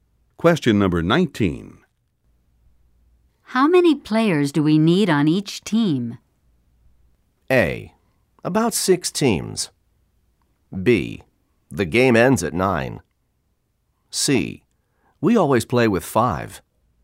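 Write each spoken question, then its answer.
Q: How many players do we need on each team?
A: C: We always play with 5.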